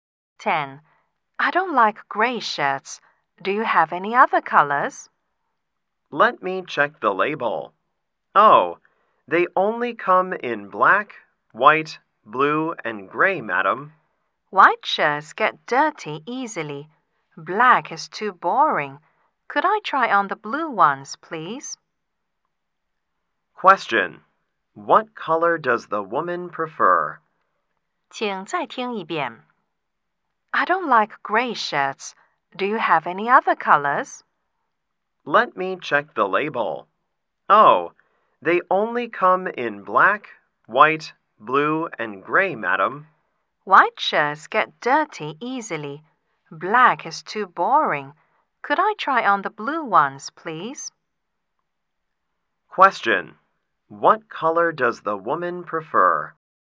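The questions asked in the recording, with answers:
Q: What color does the woman prefer?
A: Blue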